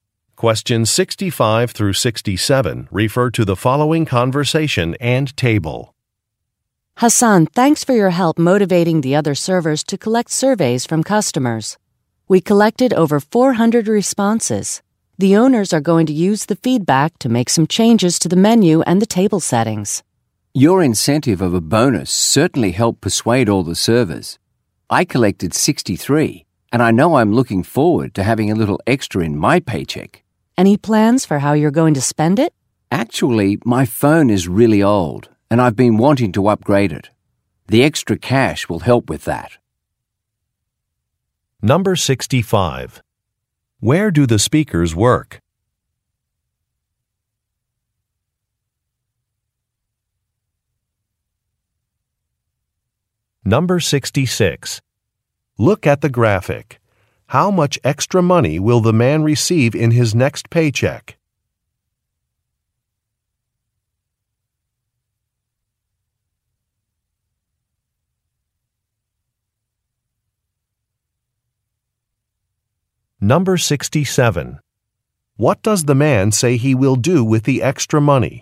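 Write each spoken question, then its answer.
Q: Where do the speakers work?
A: At a restaurant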